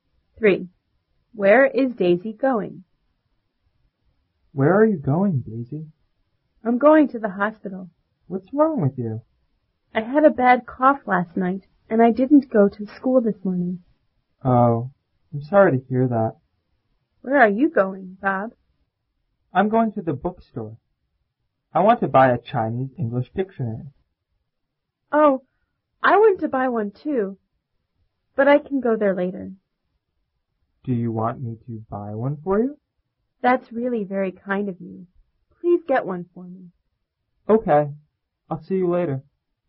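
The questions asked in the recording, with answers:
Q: Where is Daisy going?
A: To the hospital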